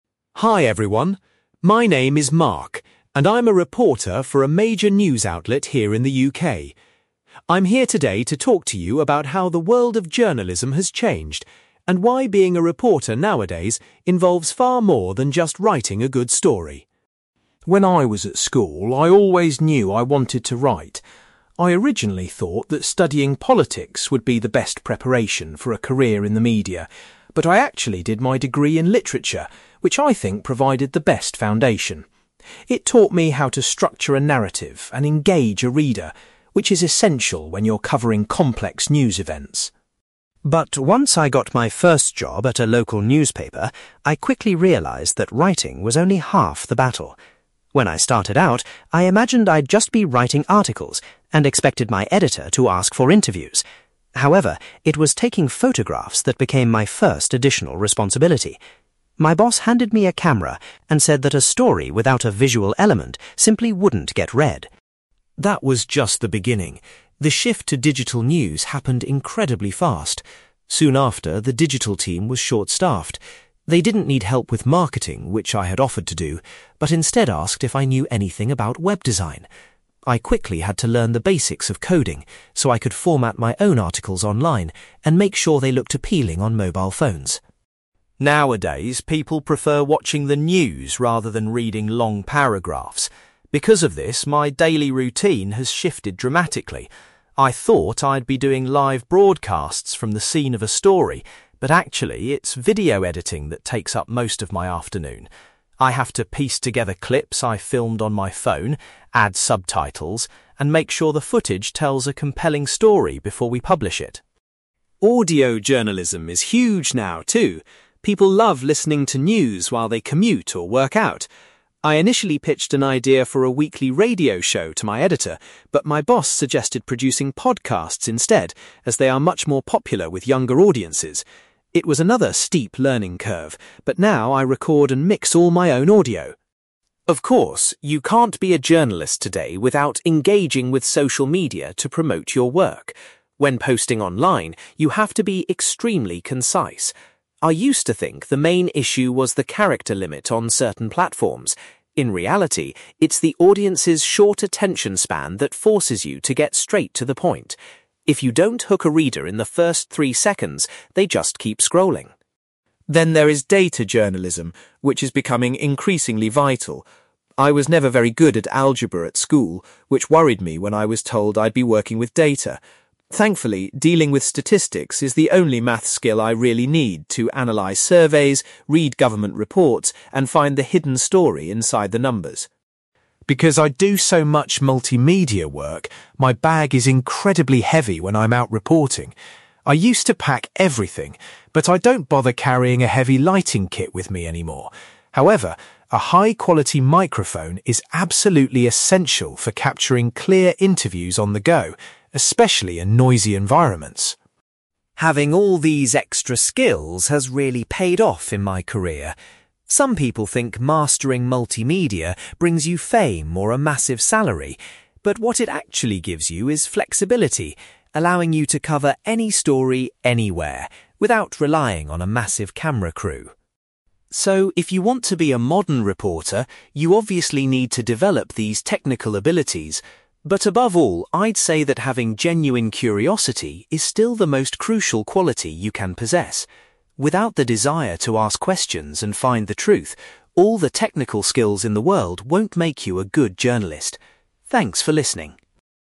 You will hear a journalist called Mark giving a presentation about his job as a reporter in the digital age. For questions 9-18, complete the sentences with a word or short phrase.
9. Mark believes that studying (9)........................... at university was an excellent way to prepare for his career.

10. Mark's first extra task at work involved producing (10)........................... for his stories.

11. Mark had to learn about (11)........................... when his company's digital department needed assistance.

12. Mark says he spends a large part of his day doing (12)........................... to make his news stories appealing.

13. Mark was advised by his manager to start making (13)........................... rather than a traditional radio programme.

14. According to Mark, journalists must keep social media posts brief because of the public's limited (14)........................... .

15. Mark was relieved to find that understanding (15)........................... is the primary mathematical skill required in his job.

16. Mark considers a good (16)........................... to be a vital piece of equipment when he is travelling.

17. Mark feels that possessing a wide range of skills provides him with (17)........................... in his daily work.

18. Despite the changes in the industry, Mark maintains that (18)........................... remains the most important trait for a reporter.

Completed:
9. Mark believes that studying literature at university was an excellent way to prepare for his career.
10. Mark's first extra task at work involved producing photographs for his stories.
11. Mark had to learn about web design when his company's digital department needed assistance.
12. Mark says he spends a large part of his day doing video editing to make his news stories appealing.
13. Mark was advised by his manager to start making podcasts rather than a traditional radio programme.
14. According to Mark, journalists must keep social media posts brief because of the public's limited attention span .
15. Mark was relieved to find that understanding statistics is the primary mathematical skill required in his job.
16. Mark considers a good microphone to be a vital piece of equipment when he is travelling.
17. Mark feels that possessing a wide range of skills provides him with flexibility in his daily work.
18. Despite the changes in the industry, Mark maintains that curiosity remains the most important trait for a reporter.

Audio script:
Mark: Hi everyone. My name is Mark, and I'm a reporter for a major news outlet here in the UK. I'm here today to talk to you about how the world of journalism has changed, and why being a reporter nowadays involves far more than just writing a good story.
When I was at school, I always knew I wanted to write. I originally thought that studying politics would be the best preparation for a career in the media, but I actually did my degree in literature, which I think provided the best foundation. It taught me how to structure a narrative and engage a reader, which is essential when you're covering complex news events.
But once I got my first job at a local newspaper, I quickly realised that writing was only half the battle. When I started out, I imagined I'd just be writing articles and expected my editor to ask for interviews. However, it was taking photographs that became my first additional responsibility. My boss handed me a camera and said that a story without a visual element simply wouldn't get read.
That was just the beginning. The shift to digital news happened incredibly fast. Soon after, the digital team was short-staffed. They didn't need help with marketing, which I had offered to do, but instead asked if I knew anything about web design. I quickly had to learn the basics of coding so I could format my own articles online and make sure they looked appealing on mobile phones.
Nowadays, people prefer watching the news rather than reading long paragraphs. Because of this, my daily routine has shifted dramatically. I thought I'd be doing live broadcasts from the scene of a story, but actually, it's video editing that takes up most of my afternoon. I have to piece together clips I've filmed on my phone, add subtitles, and make sure the footage tells a compelling story before we publish it.
Audio journalism is huge now, too. People love listening to news while they commute or work out. I initially pitched an idea for a weekly radio show to my editor, but my boss suggested producing podcasts instead, as they are much more popular with younger audiences. It was another steep learning curve, but now I record and mix all my own audio.
Of course, you can't be a journalist today without engaging with social media to promote your work. When posting online, you have to be extremely concise. I used to think the main issue was the character limit on certain platforms. In reality, it's the audience's short attention span that forces you to get straight to the point. If you don't hook a reader in the first three seconds, they just keep scrolling.
Then there is data journalism, which is becoming increasingly vital. I was never very good at algebra at school, which worried me when I was told I'd be working with data. Thankfully, dealing with statistics is the only maths skill I really need to analyse surveys, read government reports, and find the hidden story inside the numbers.
Because I do so much multimedia work, my bag is incredibly heavy when I'm out reporting. I used to pack everything, but I don't bother carrying a heavy lighting kit with me anymore; however, a high-quality microphone is absolutely essential for capturing clear interviews on the go, especially in noisy environments.
Having all these extra skills has really paid off in my career. Some people think mastering multimedia brings you fame or a massive salary, but what it actually gives you is flexibility, allowing you to cover any story, anywhere, without relying on a massive camera crew.
So, if you want to be a modern reporter, you obviously need to develop these technical abilities. But above all, I'd say that having genuine curiosity is still the most crucial quality you can possess. Without the desire to ask questions and find the truth, all the technical skills in the world won't make you a good journalist. Thanks for listening.

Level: B2